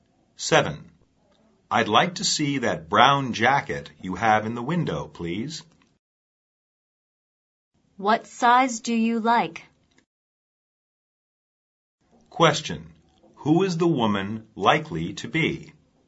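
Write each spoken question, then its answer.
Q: Who is the woman likely to be?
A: A shop assistant.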